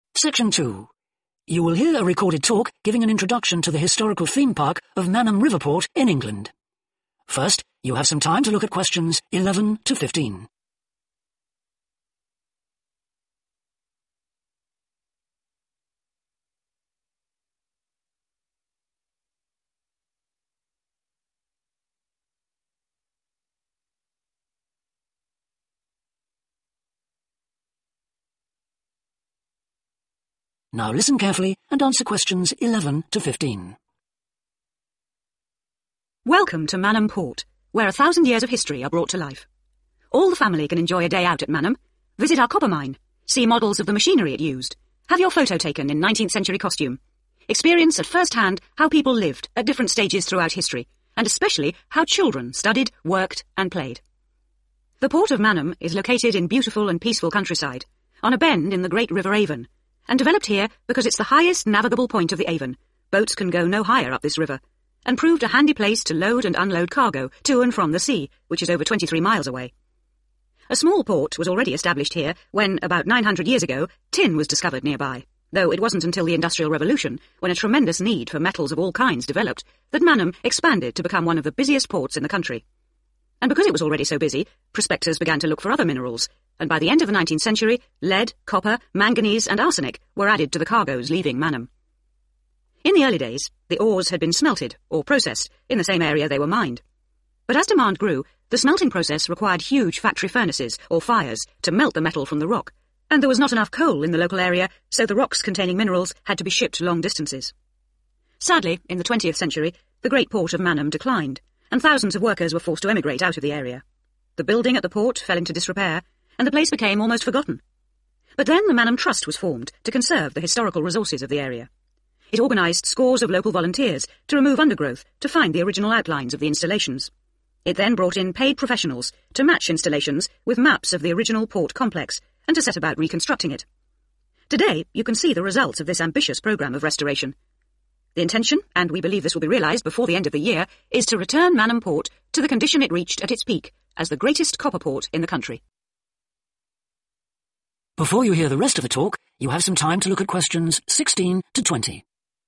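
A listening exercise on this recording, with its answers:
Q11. Why did a port originally develop at Manham?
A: It was convenient for river transport.

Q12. What caused Manham's sudden expansion during the Industrial Revolution?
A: the increase in demand for metals

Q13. Why did rocks have to be sent away from Manham to be processed?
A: shortage of fuel

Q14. What happened when the port declined in the twentieth century?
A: The workers went away.

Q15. What did the Manham Trust hope to do?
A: rebuild the port complex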